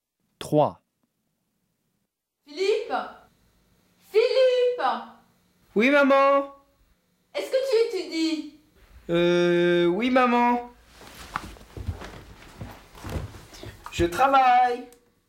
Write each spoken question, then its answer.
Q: Est-ce que tu étudies?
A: 3, A